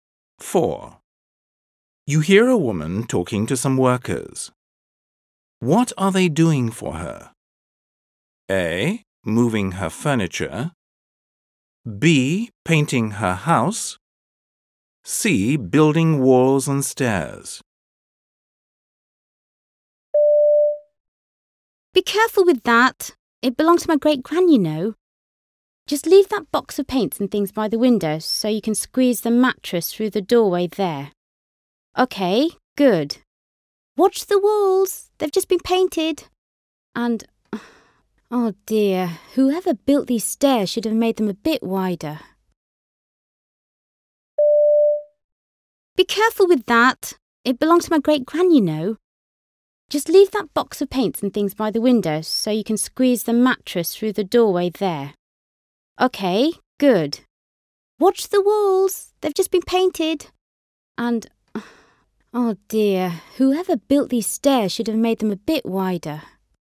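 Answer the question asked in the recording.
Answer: A: Moving her furniture.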